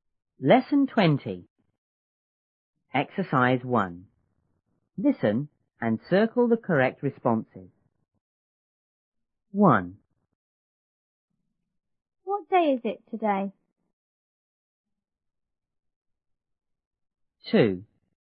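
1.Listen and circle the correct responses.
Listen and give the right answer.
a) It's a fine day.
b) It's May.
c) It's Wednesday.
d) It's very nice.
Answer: c) It's Wednesday.

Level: 初中英语广州版1B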